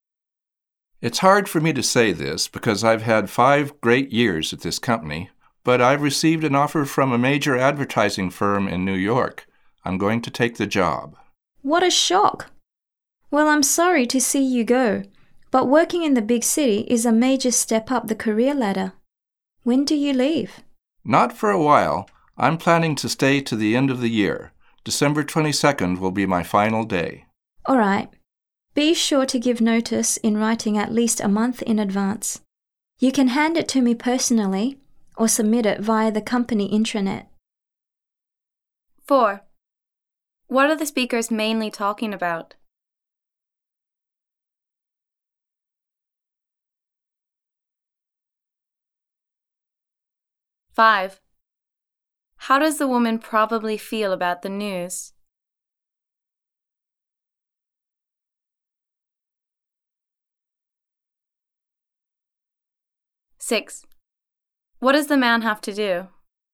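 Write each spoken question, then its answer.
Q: What are the speakers mainly talking about?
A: The man leaving the company for a new job in New York

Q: How does the woman probably feel about the news?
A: Surprised (shocked)

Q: What does the man have to do?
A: Give written notice at least a month in advance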